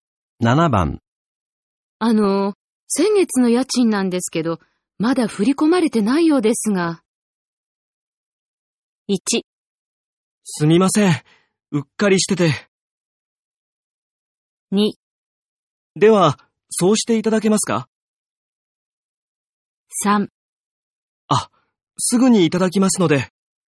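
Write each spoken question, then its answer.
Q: 先月の家賃なんですけど、まだ振り込まれてないようですが。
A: 1: すみません。うっかりしてて。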